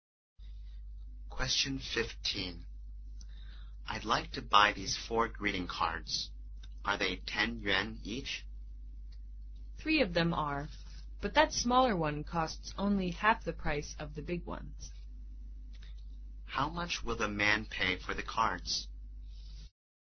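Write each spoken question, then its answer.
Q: How much will the man pay for the cards?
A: 35 yuan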